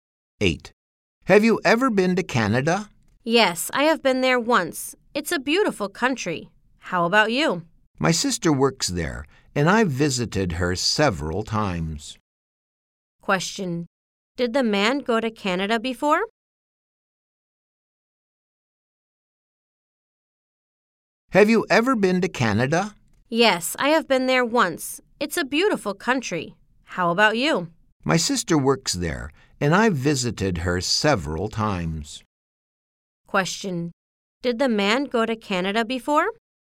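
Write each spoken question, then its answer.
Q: Question. Did the man go to Canada before?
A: Yes, he did.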